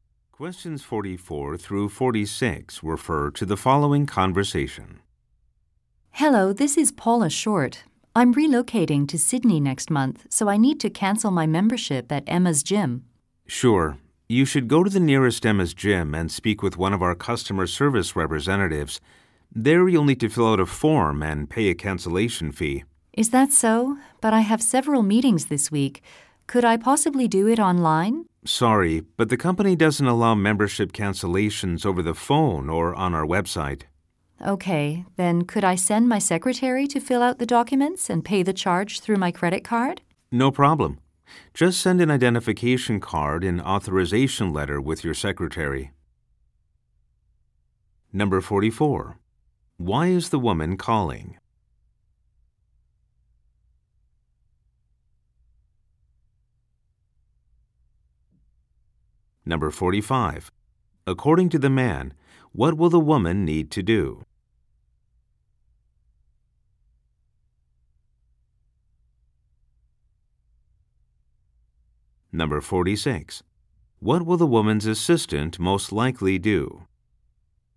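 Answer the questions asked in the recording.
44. To cancel her gym membership
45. Go to the nearest gym, fill out a form and pay a cancellation fee
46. Go to the gym with an ID card and authorization letter to fill out the documents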